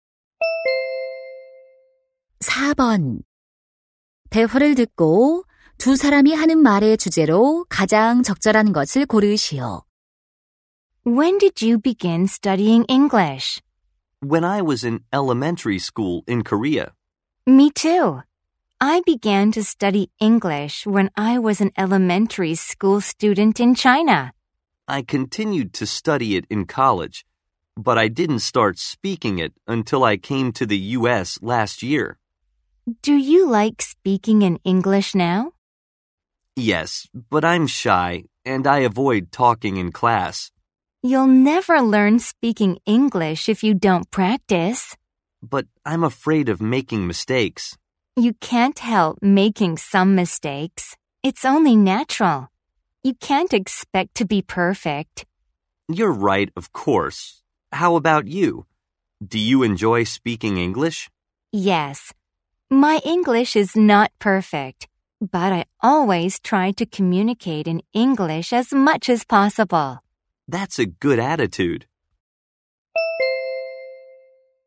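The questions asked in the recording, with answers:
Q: 대화를 듣고 두 사람이 하는 말의 주제로 가장 적절한 것을 고르시오.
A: 실수를 두려워하지 않고 영어 말하기를 연습하는 것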